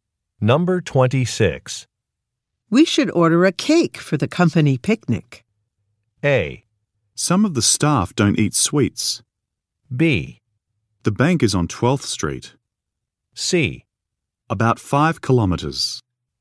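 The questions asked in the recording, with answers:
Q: We should order a cake for the company picnic.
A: A: Some of the staff don't eat sweets.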